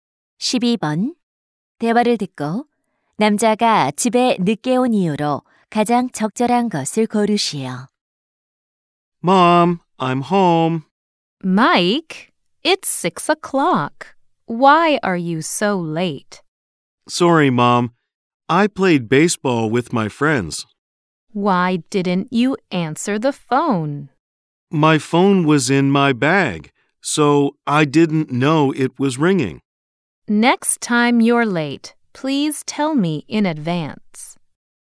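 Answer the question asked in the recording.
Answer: 친구들과 야구를 해서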